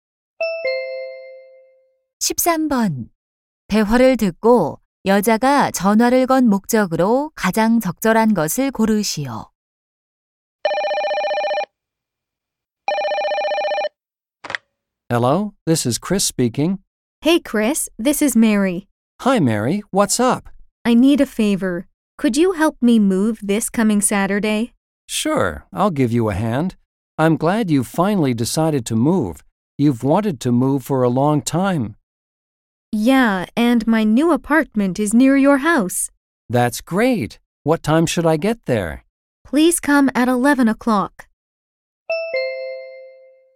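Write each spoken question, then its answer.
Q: 대화를 듣고 여자가 전화를 건 목적으로 가장 적절한 것을 고르시오.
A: 이사를 도와 달라고 부탁하려고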